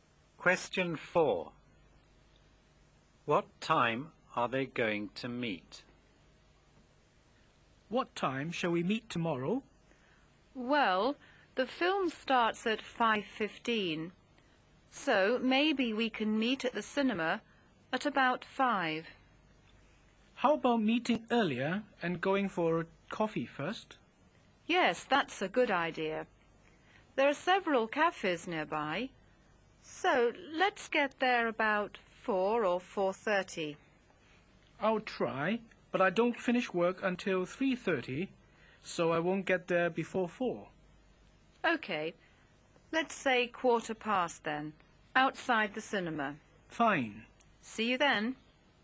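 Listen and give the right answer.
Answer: At 4:15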